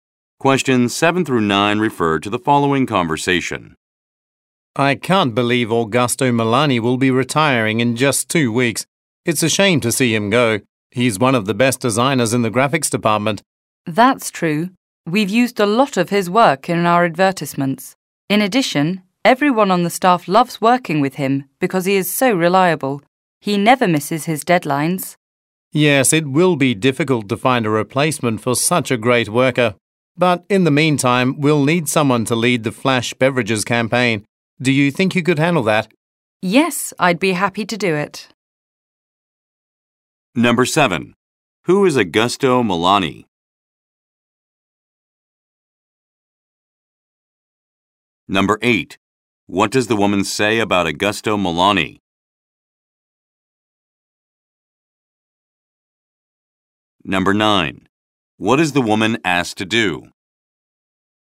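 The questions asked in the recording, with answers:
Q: Who is Augusto Milani?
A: A designer in the graphics department

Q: What is the woman asked to do?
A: Lead the Flash Beverages campaign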